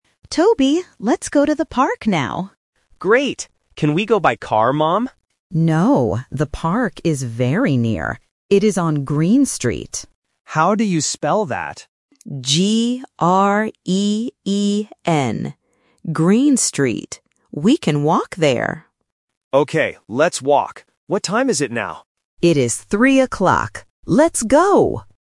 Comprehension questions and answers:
Listen to the conversation and choose the correct answer (A, B, or C).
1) Where is the park?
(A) On Grey Street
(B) On Green Street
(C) On Queen Street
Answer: (B) On Green Street

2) How do they go to the park?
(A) They walk.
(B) They go by car.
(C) They go by bus.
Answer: (A) They walk.

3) What time do they go?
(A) 3:00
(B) 1:00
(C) 5:00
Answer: (A) 3:00

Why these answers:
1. The mother spells the name of the street clearly: G-R-E-E-N. Option (A) and (C) are distractors with similar sounds ("Grey", "Queen") to test the student's spelling recognition.
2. The boy asks to go by car (Option B), but the mother says "No" and suggests "We can walk there." Option (C) is not mentioned in the dialogue.
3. The mother states the time directly: "It is three o'clock." Option (B) and (C) are simple number distractors.

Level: A1

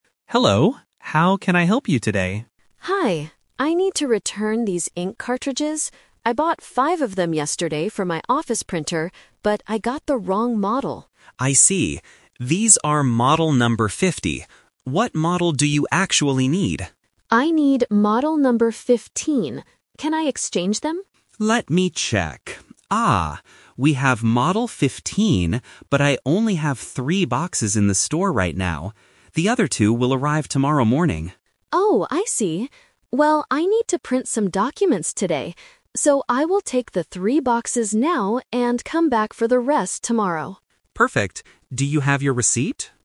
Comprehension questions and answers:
Listen to the conversation between an office worker and a store clerk. Read the questions and choose the correct answer (A, B, or C).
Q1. Why is the woman returning the ink cartridges?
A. They are empty.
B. She bought the wrong model.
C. Her office printer is broken.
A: B. She bought the wrong model.

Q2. What model number does the woman need?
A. 5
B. 15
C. 50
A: B. 15

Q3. How many new ink cartridges will the woman take today?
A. Two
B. Three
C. Five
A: B. Three

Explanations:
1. The woman explicitly says, "...but I got the wrong model." Why the trap is wrong: Option (C) is a trap. She mentions her "office printer," but she does not say it is broken. Option (A) is a common reason to buy ink, but it is not mentioned in the audio.
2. The woman says, "I need model number 15." Why the trap is wrong: Option (C) is a major trap. Model 50 is the wrong model that she is returning, not the one she needs. Option (A) is the number of boxes she bought (five), not the model number.
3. This is the "Twist." She says, "I will take the three boxes now..." Why the trap is wrong: Option (C) is her original plan (she wanted to exchange all 5 today), but the store didn't have enough. Option (A) is the number of boxes that will arrive tomorrow.

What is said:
Clerk: Hello, how can I help you today?
Admin: Hi. I need to return these ink cartridges. I bought five of them yesterday for my office printer, but I got the wrong model.
Clerk: I see. These are model number 50. What model do you actually need?
Admin: I need model number 15. Can I exchange them?
Clerk: Let me check... Ah. We have model 15, but I only have three boxes in the store right now. The other two will arrive tomorrow morning.
Admin: Oh, I see. Well, I need to print some documents today. So, I will take the three boxes now and come back for the rest tomorrow.

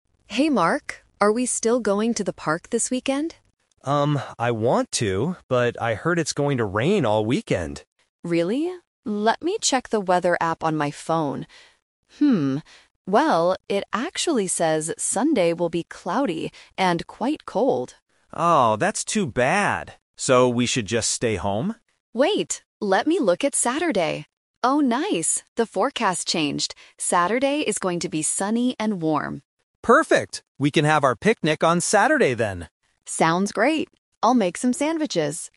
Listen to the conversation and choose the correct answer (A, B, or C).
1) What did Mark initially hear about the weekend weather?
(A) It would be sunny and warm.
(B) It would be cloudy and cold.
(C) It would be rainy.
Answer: (C) It would be rainy.

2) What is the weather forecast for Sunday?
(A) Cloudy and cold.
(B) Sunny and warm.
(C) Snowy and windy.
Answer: (A) Cloudy and cold.

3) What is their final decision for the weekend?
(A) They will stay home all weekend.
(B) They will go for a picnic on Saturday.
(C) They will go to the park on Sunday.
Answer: (B) They will go for a picnic on Saturday.

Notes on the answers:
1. Mark says, "I heard it's going to rain all weekend." Option (A) is the trap because it is the actual weather for Saturday, not what Mark initially heard. Option (B) is the trap because that is the forecast for Sunday.
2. Sarah checks her phone and says, "Sunday will be cloudy and quite cold." Option (B) is a trap because it describes Saturday. Option (C) is plausible for bad weather but was never mentioned in the audio.
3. Mark says, "We can have our picnic on Saturday then," and Sarah agrees. Option (A) is a trap because Mark asks, "So we should just stay home?" but Sarah changes the plan when she sees Saturday's sunny forecast. Option (C) is a trap because Sunday's weather is bad, so they rejected going out on that day.

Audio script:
Sarah: Hey Mark, are we still going to the park this weekend?
Mark: Um, I want to, but I heard it's going to rain all weekend.
Sarah: Really? Let me check the weather app on my phone. well, it actually says Sunday will be cloudy and quite cold.
Mark: Oh, that's too bad. So we should just stay home?
Sarah: Wait, let me look at Saturday. Oh, nice! The forecast changed. Saturday is going to be sunny and warm.
Mark: Perfect! We can have our picnic on Saturday then.

